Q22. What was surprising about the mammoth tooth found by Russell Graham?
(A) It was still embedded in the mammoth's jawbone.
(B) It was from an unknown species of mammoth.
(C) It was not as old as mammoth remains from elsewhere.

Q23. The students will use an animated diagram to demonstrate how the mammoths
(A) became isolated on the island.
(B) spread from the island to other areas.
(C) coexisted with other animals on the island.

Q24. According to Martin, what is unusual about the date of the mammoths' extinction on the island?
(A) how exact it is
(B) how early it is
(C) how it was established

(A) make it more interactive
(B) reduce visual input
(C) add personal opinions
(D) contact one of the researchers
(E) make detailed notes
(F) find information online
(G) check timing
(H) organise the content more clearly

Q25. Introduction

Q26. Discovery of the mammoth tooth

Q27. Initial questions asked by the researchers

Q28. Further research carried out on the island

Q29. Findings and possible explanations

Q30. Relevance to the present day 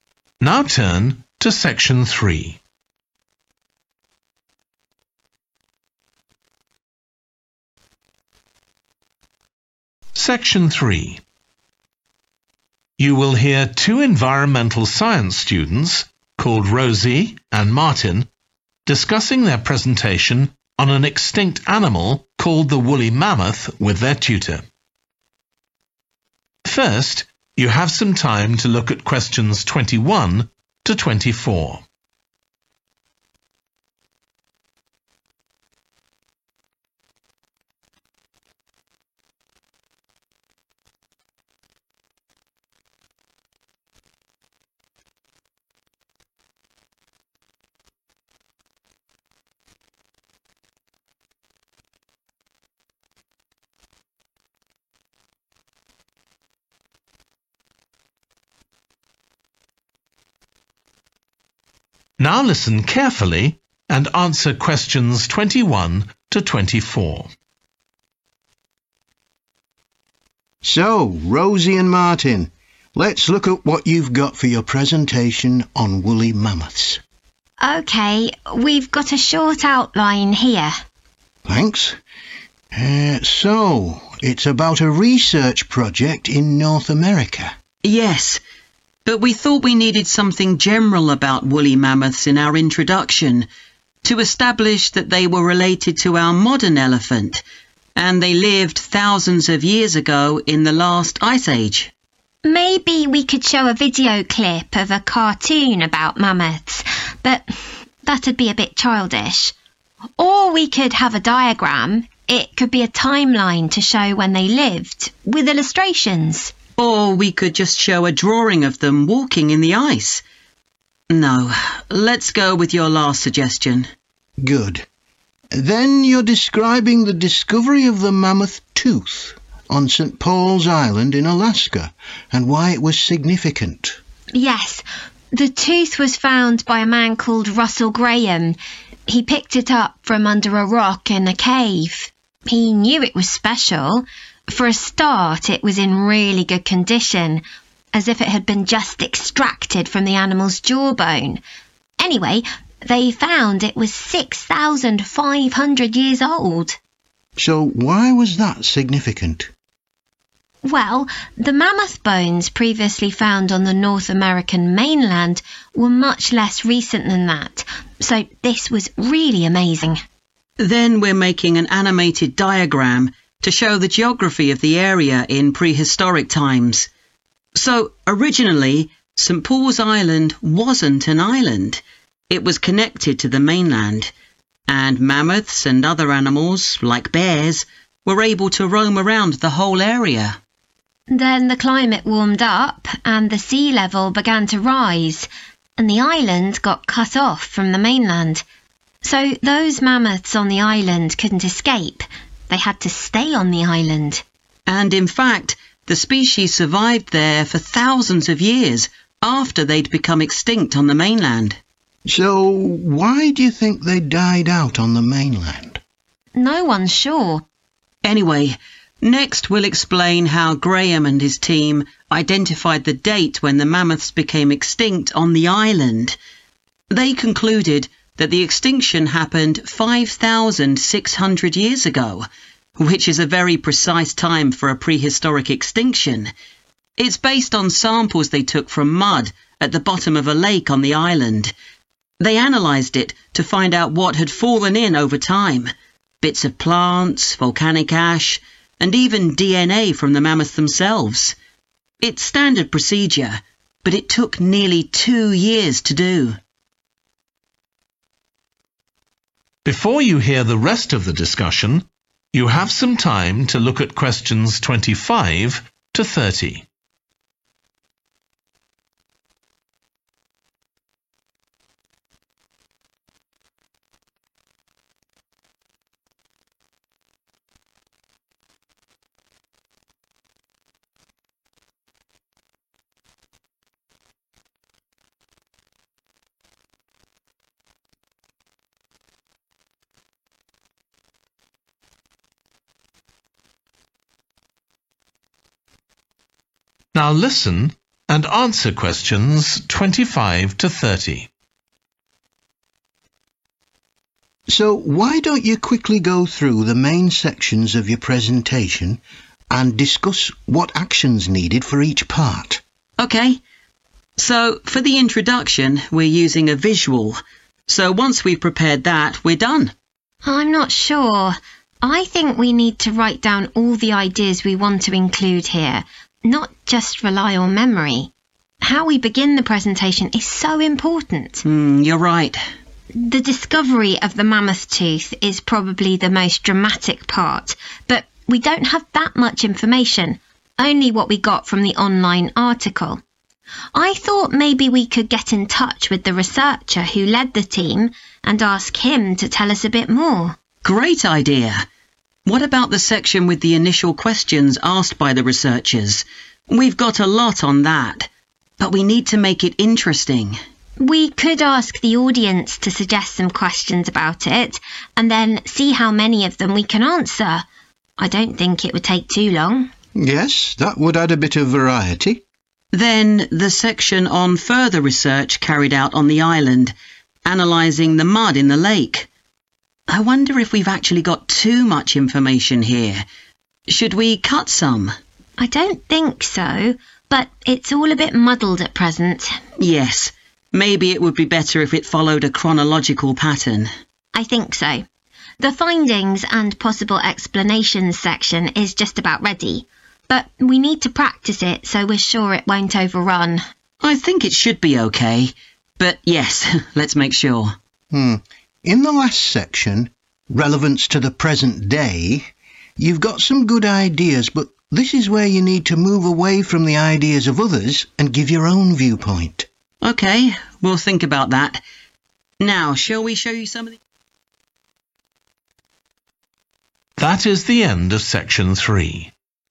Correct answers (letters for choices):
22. C
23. A
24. A
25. E
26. D
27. A
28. H
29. G
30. C